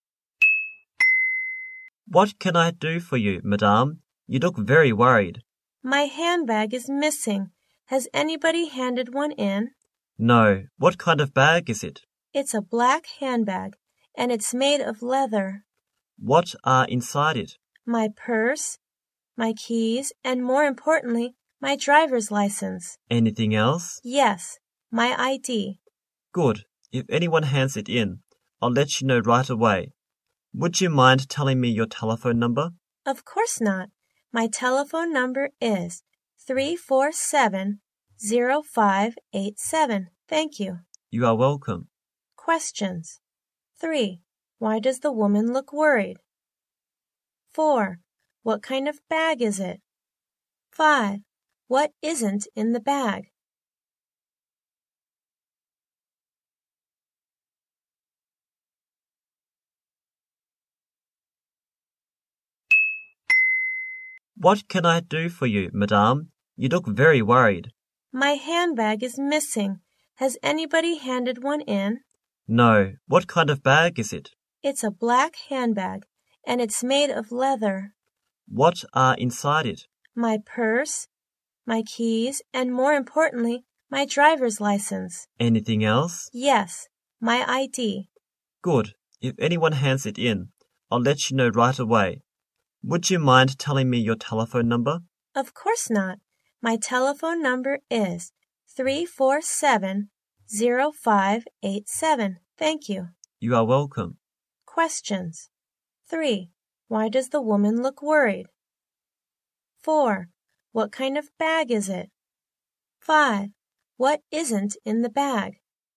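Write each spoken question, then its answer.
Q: Why does the woman look worried?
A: Her handbag is missing

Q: What kind of bag is it?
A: A black leather handbag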